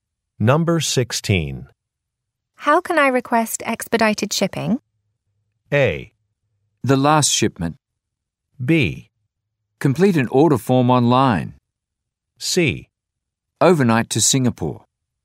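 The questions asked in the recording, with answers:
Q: How can I request expedited shipping?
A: B: Complete an order form online.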